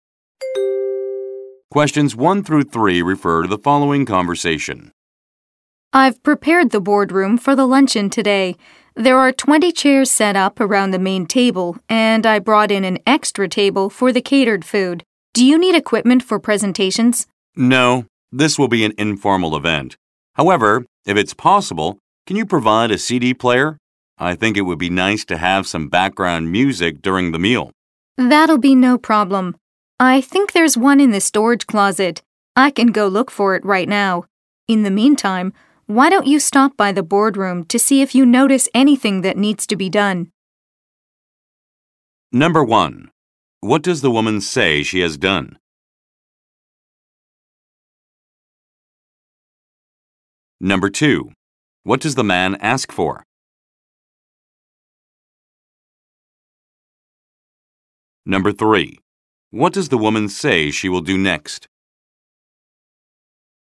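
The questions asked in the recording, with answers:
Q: What does the woman say she has done?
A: Prepared the boardroom for the luncheon

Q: What does the man ask for?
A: A CD player

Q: What does the woman say she will do next?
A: Look for a CD player in the storage closet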